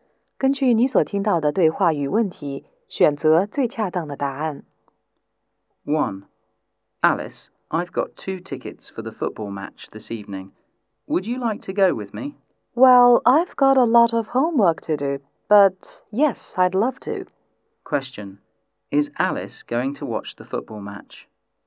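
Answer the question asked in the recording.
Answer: Yes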